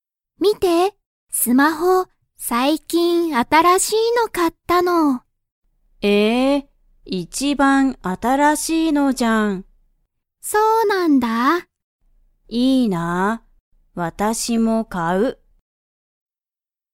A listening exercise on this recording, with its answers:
カオリもスマホを買(か)いたいですか?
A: はい

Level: Level 1